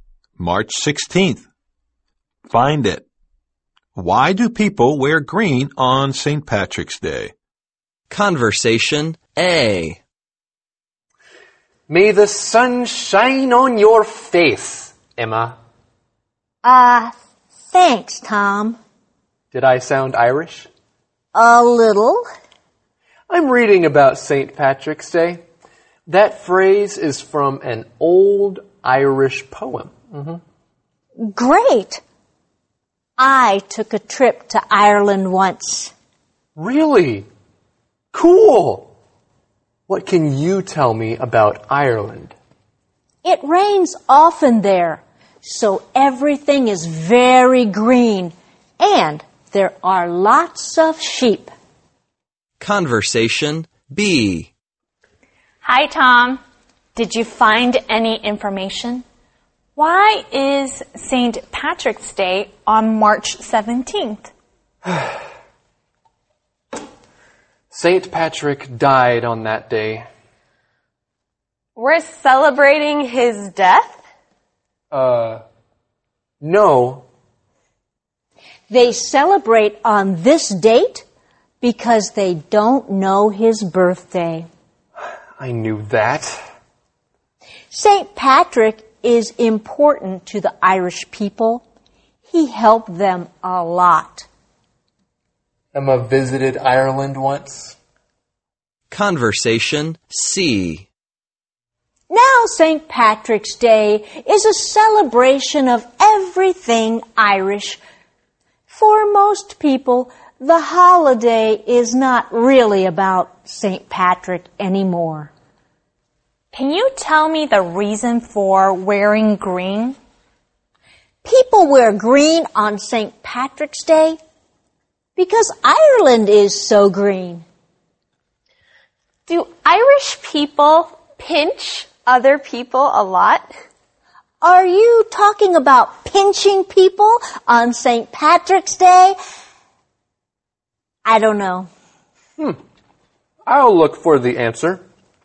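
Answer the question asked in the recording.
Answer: Because Ireland is so green.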